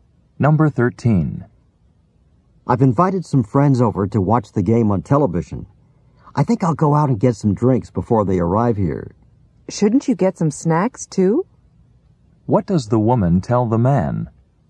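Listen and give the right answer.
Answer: He should get some snacks too.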